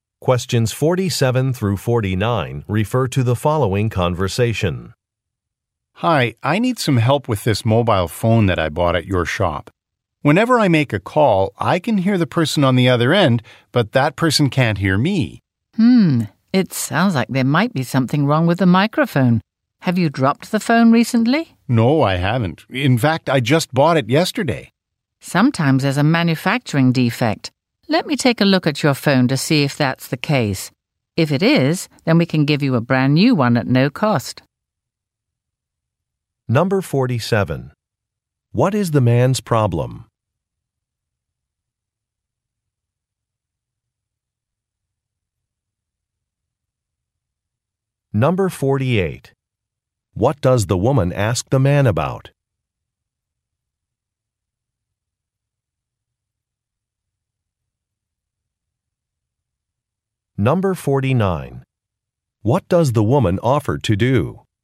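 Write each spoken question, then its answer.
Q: What is the man's problem?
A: When he makes a call on his new mobile phone, the other person can't hear him

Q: What does the woman ask the man about?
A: Whether he has dropped the phone recently

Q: What does the woman offer to do?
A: Look at the phone and, if it has a manufacturing defect, give him a brand new one at no cost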